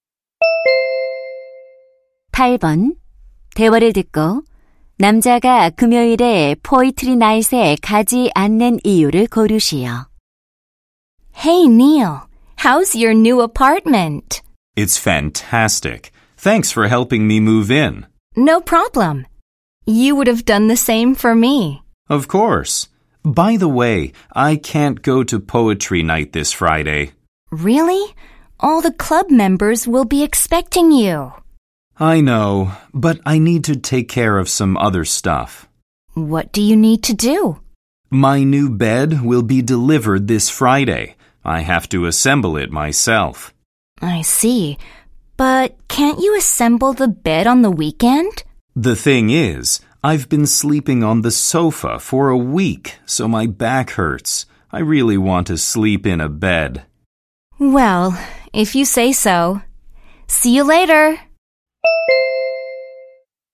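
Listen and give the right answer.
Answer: 배달될 새 침대를 조립해야 해서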